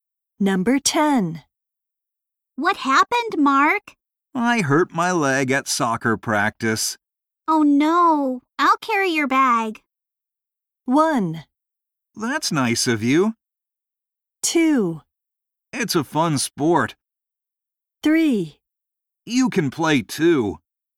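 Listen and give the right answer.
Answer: 1: That's nice of you.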